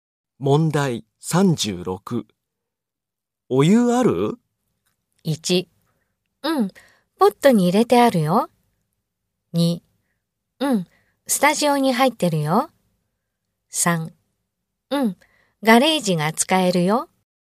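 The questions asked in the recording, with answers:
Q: お湯ある?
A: 1: うん。ポットに入れてあるよ。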